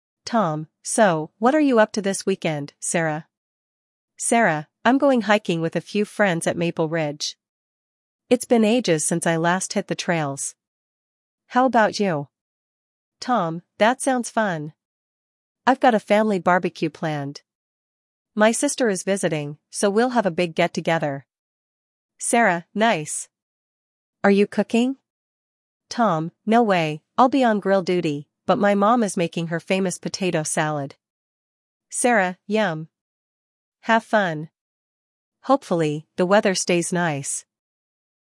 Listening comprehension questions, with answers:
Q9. Where is Sarah going this weekend?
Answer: Maple Ridge for hiking

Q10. Who is Tom planning to meet during the weekend?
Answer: His sister

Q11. What is Tom's role at the barbecue?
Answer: Grill duty

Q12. What food is Tom's mom preparing?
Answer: Potato salad

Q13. What does Sarah hope for regarding the weather?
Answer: That the weather stays nice

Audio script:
Tom: So, what are you up to this weekend, Sarah?
Sarah: I'm going hiking with a few friends at Maple Ridge. It's been ages since I last hit the trails. How about you?
Tom: That sounds fun! I've got a family barbecue planned. My sister is visiting, so we'll have a big get-together.
Sarah: Nice! Are you cooking?
Tom: No way—I'll be on grill duty, but my mom is making her famous potato salad.
Sarah: Yum! Have fun. Hopefully, the weather stays nice.